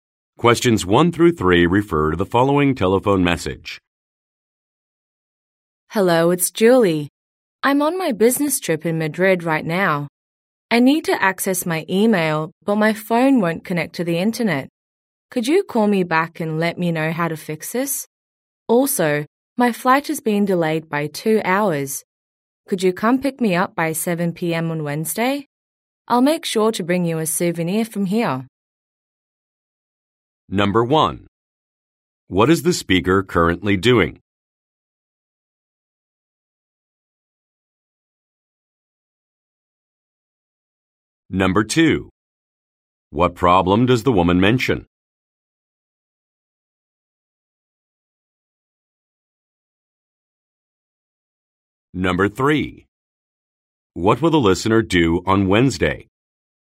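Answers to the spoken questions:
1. Going on a business trip in Madrid.
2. Her phone won't connect to the internet.
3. Pick the speaker up.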